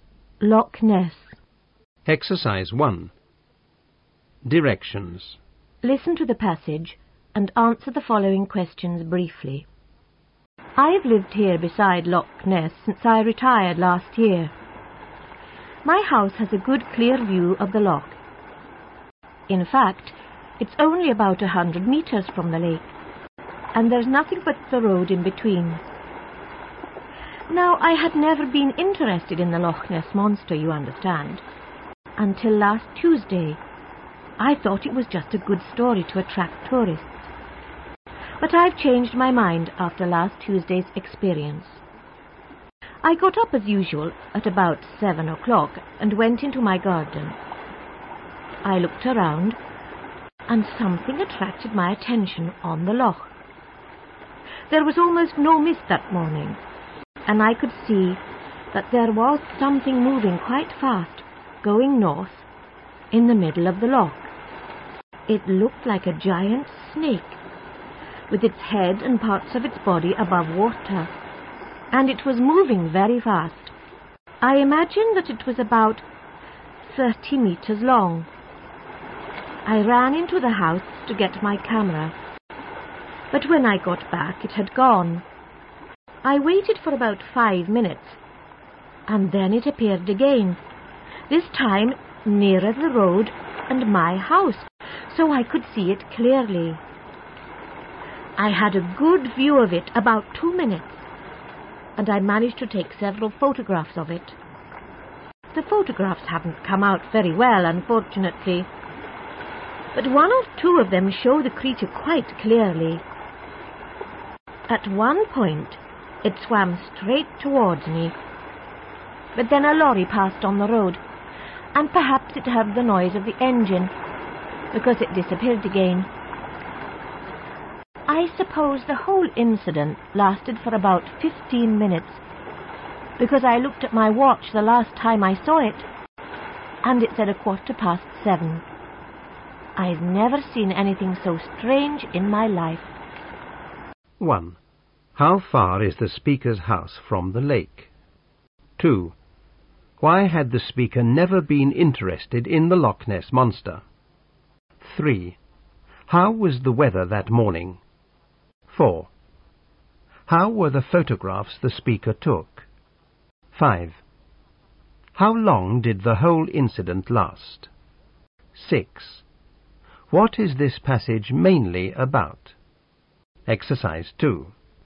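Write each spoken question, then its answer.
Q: How far is the speaker's house from the lake?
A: About 100 meters

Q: Why had the speaker never been interested in the Loch Ness Monster?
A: He thought it was just a story to attract tourists

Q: How was the weather that morning?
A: Clear, almost no mist

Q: How were the photographs the speaker took?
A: Not very good, but one or two show the creature clearly

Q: How long did the whole incident last?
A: About 15 minutes

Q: What is this passage mainly about?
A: The speaker's sighting of the Loch Ness Monster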